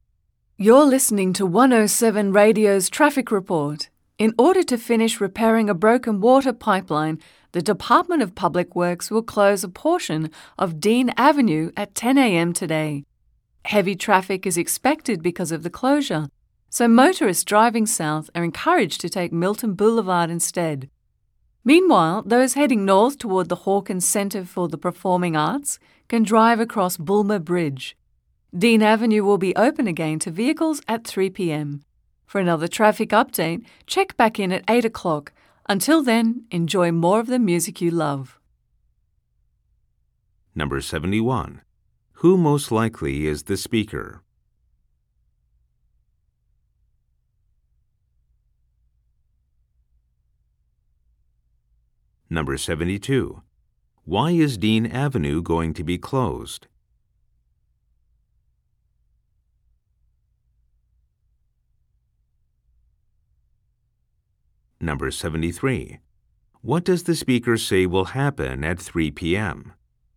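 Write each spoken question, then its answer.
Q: Who most likely is the speaker?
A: A radio traffic reporter

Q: Why is Dean Avenue going to be closed?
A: To finish repairing a broken water pipeline

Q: What does the speaker say will happen at 3 p.m.?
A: Dean Avenue will reopen to vehicles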